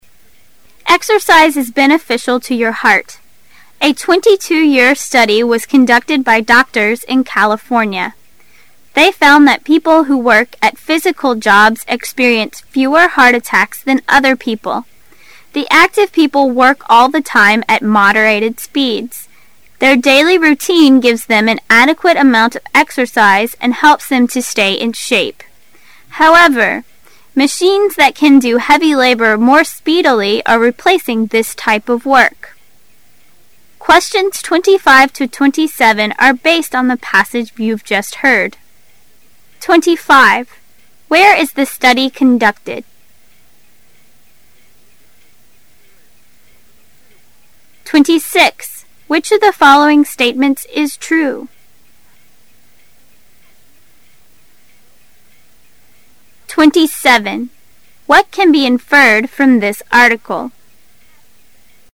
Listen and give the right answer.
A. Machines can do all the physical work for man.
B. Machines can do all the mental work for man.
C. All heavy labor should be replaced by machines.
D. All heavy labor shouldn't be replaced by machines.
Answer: D. All heavy labor shouldn't be replaced by machines.

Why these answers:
该题考查对关键句的把握。听时注意到短文最后一句中的表转折关系的副词however,由此可推知正确选项为D。实际四个选项中A和B.及c 和D相矛盾,可缩小选择范围。

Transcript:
[解析] 25-27 Exercise is beneficial to your heart. A 22 - year study was conducted by doctors in California. They found that people who work at physical jobs experience fewer heart attacks than other people. The active people work all the time at moderated speeds. Their daily rountine gives them an adequate amount of exercise and helps them stay in shape. However, machines that can do heavy labor more speedily are replacing this type of work. Where is the study conducted?
[解析] Which of the following statements is true?